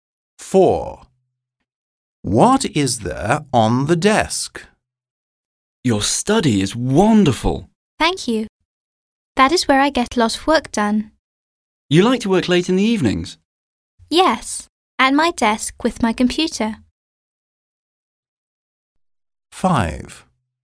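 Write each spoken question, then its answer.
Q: What is there on the desk?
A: A computer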